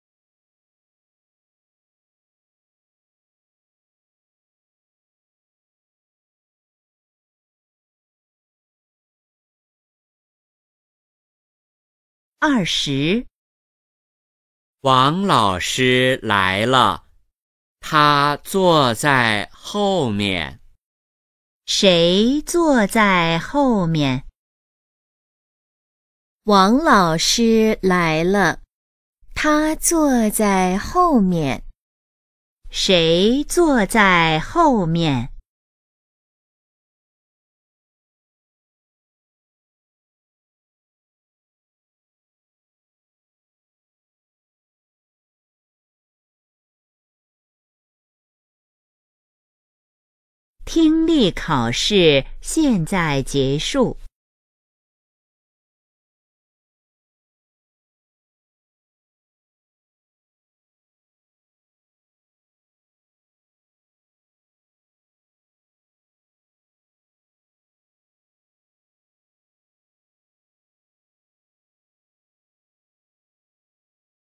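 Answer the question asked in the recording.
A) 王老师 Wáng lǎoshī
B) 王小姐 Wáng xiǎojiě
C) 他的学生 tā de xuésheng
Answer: A) 王老师 Wáng lǎoshī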